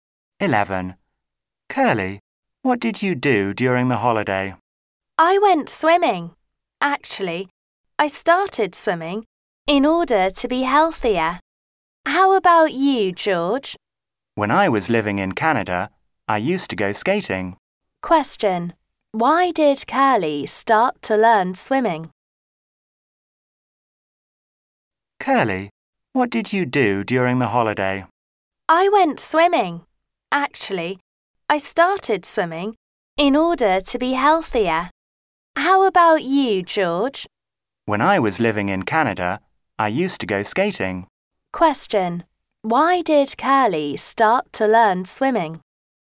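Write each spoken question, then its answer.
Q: Why did Curly start to learn swimming?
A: To be healthier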